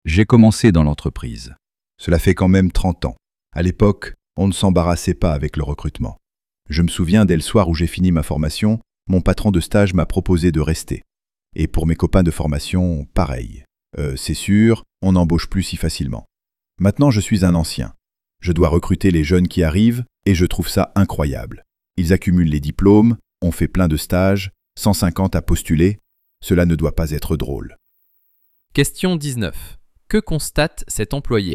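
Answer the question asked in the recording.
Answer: Qu'aujourd'hui il est beaucoup plus difficile pour les jeunes d'être embauchés qu'il y a 30 ans.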